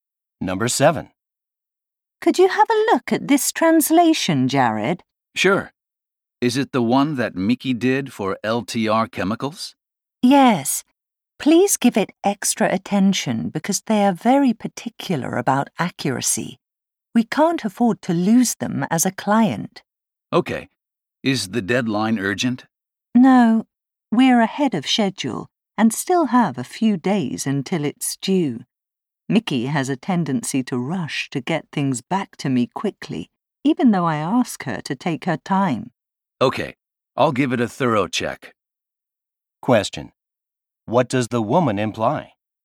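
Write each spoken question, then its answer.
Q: What does the woman imply?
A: Mickey's translation may contain mistakes because she rushes.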